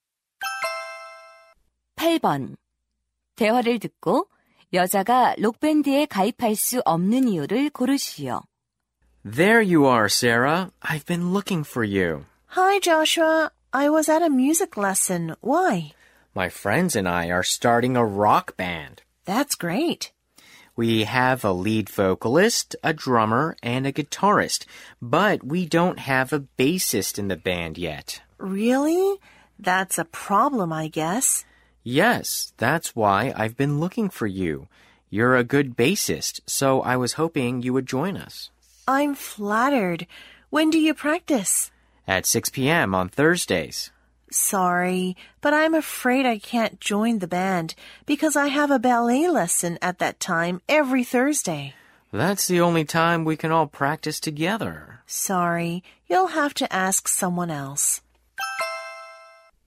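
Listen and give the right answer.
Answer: 목요일 그 시간에 발레 수업이 있어서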